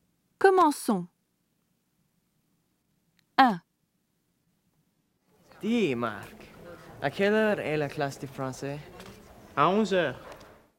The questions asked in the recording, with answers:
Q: Dis, Marc, à quelle heure est la classe de français?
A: 1, 11 o'clock